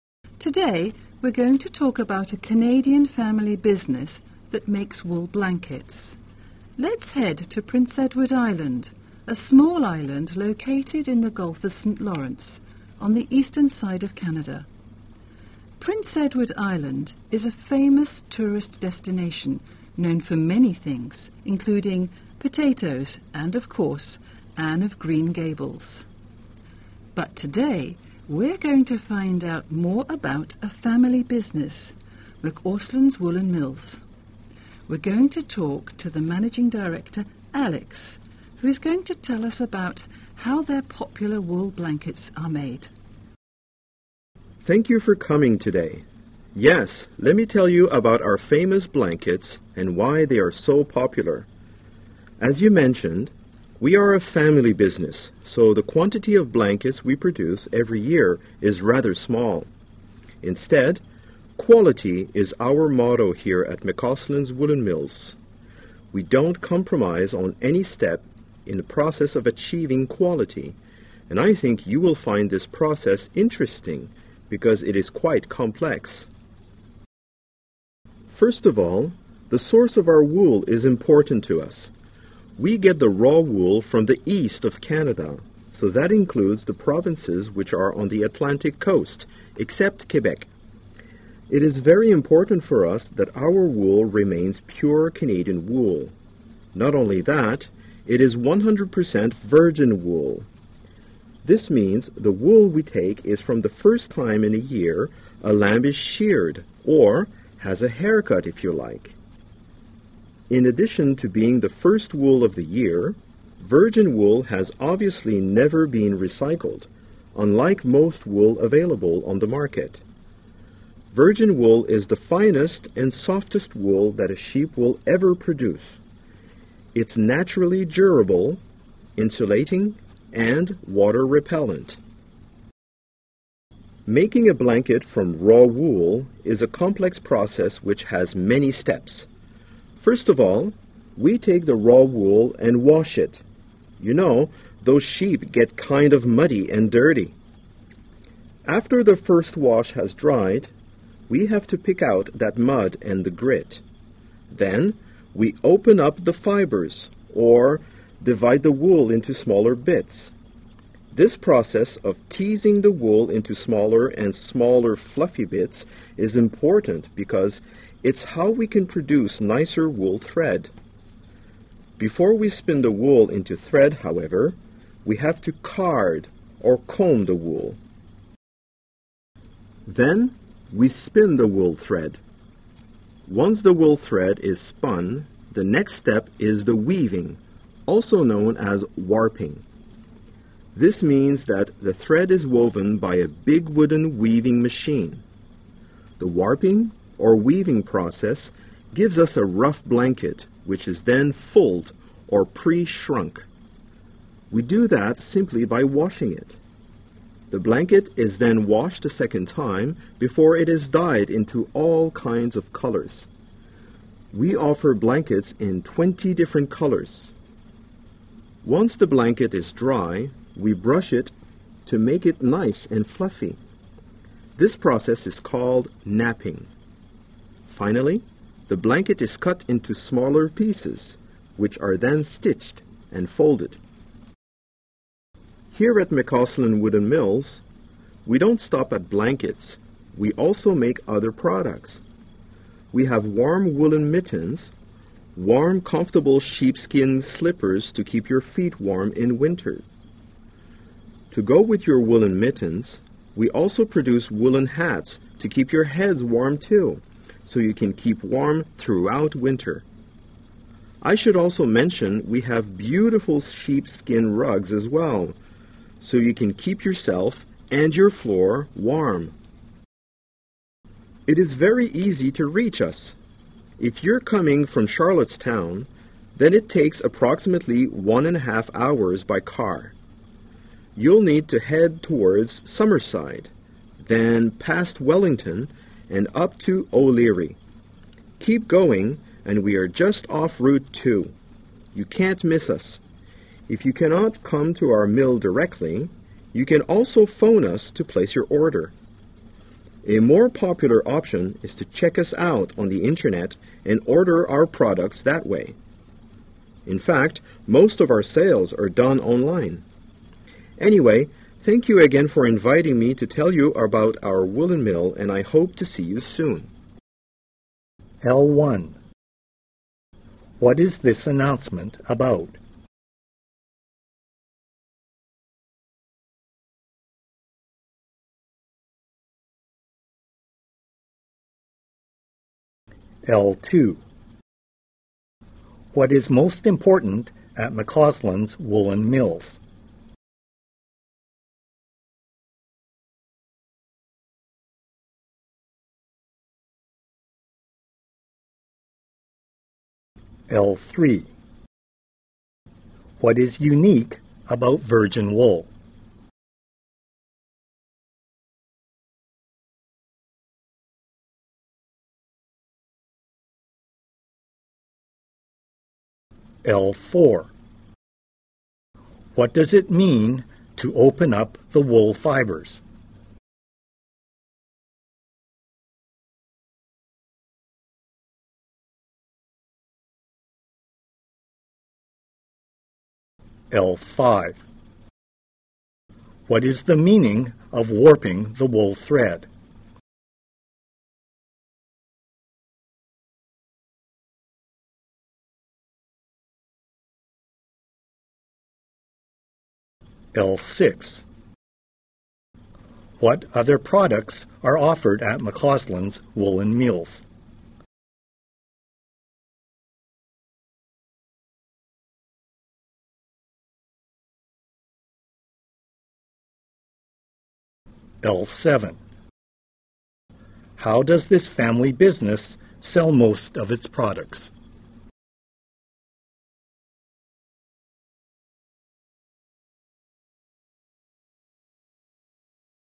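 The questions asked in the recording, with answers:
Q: What is this announcement about?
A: A Canadian family business that makes wool blankets (McAusland's Woolen Mills)

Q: What is most important at McCausland's woolen mills?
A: Quality

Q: What is unique about virgin wool?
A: It comes from a lamb's first shearing of the year and has never been recycled

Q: What does it mean to open up the wool fibers?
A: To divide the wool into smaller bits

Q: What is the meaning of warping the wool thread?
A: Weaving the thread on a big wooden weaving machine

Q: What other products are offered at McCausland's Woolen Mills?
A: Woolen mittens, sheepskin slippers, woolen hats and sheepskin rugs

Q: How does this family business sell most of its products?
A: Online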